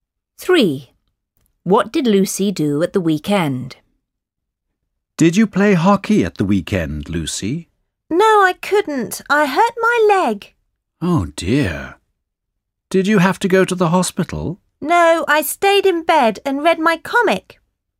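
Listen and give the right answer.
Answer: stayed in bed and read her comic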